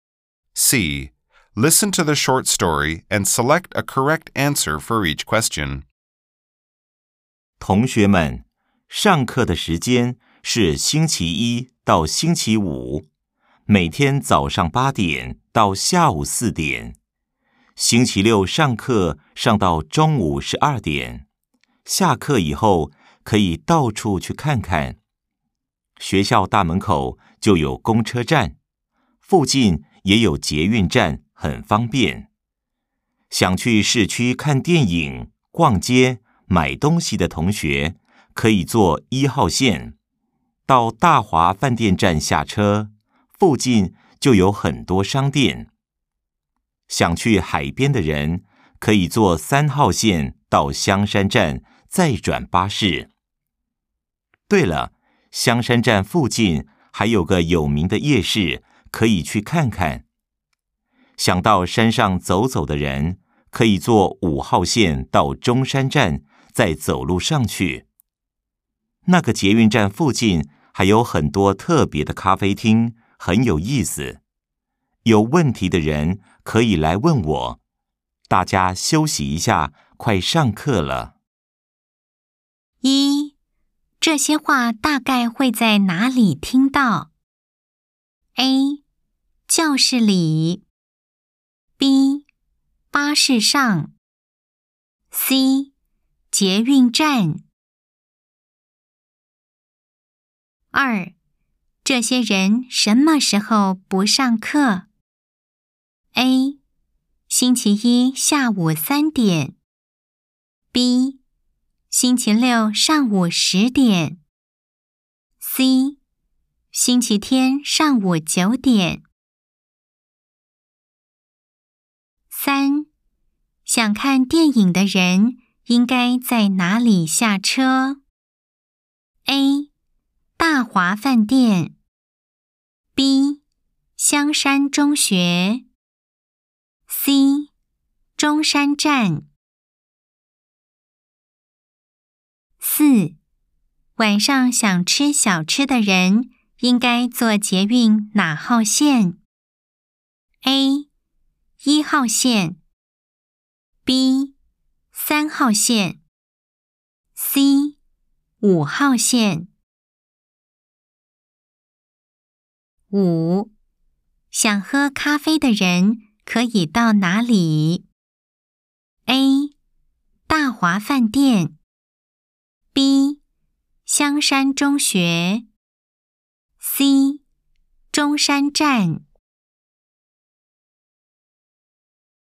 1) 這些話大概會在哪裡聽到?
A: 教室裡

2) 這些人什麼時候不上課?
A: 星期天上午九點

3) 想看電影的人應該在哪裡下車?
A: 大華飯店

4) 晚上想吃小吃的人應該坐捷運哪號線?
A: 三號線

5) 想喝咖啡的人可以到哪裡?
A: 中山站